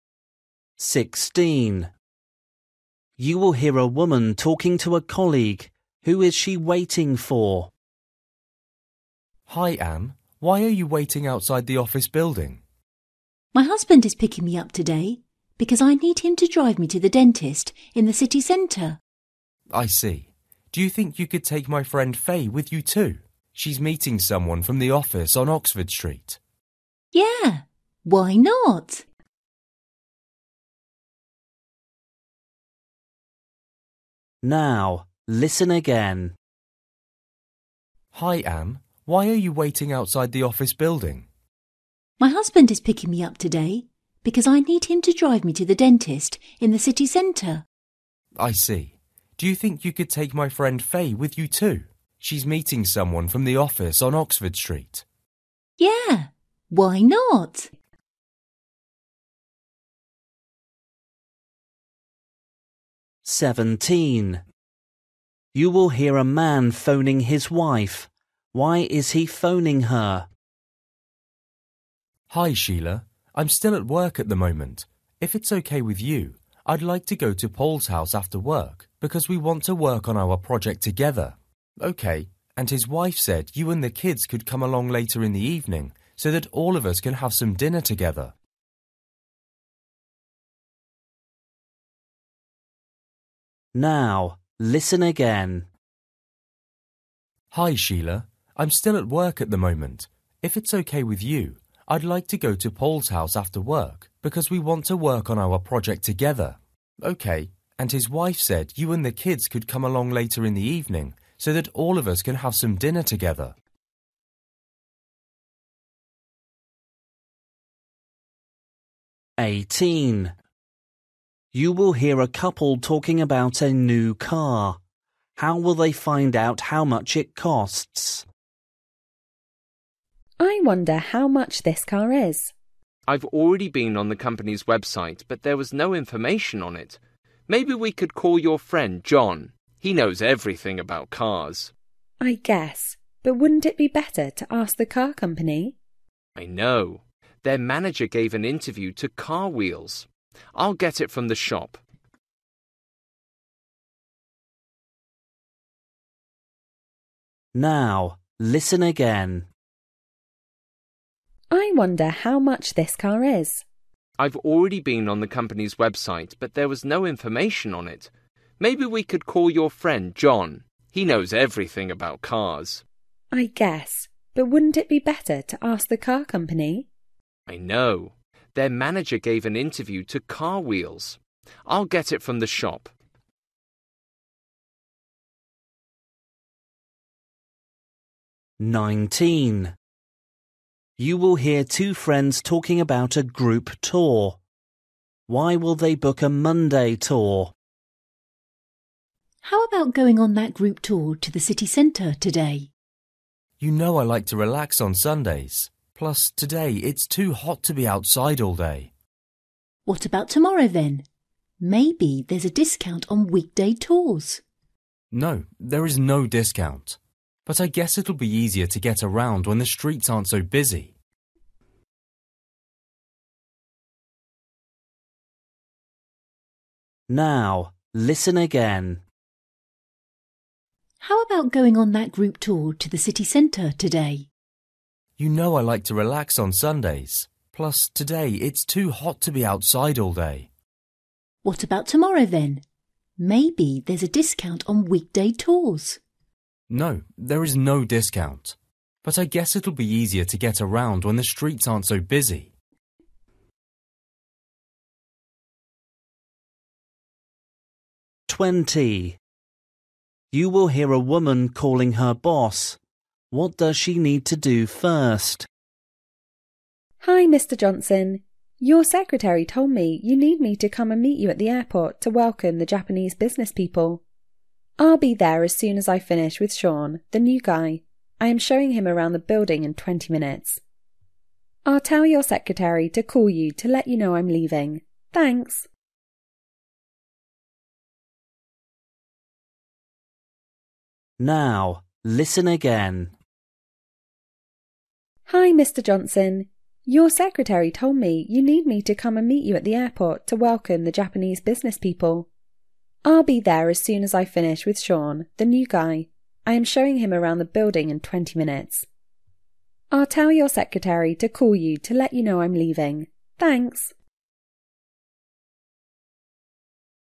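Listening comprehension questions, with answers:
For each question, choose the correct answer.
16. You will hear a woman talking to a colleague. Who is she waiting for?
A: her husband

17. You will hear a man phoning his wife. Why is he phoning her?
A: to say he wants to go to Paul's house after work to work on their project

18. You will hear a couple talking about a new car. How will they find out how much it costs?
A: by reading the magazine Car Wheels

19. You will hear two friends talking about a group tour. Why will they book a Monday tour?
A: the streets will be less busy

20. You will hear a woman calling her boss. What does she need to do first?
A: show the new employee Sean around the building

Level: Luyện nghe trình độ A2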